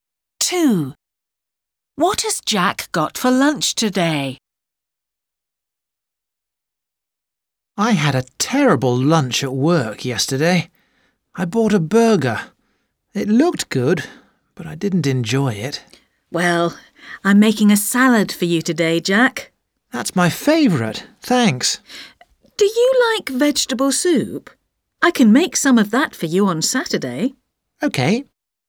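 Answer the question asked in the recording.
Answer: A salad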